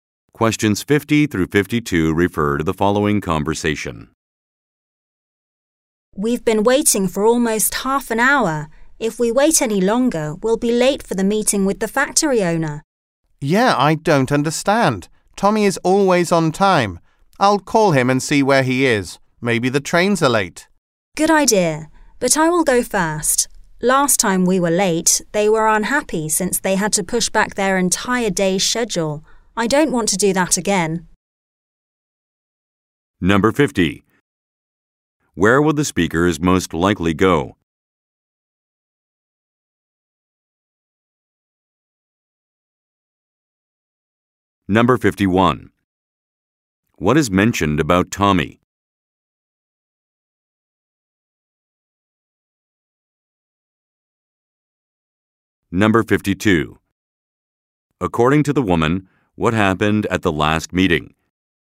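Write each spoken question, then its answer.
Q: What is mentioned about Tommy?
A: He is always on time

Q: According to the woman, what happened at the last meeting?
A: They were late, so the others had to push back their whole day's schedule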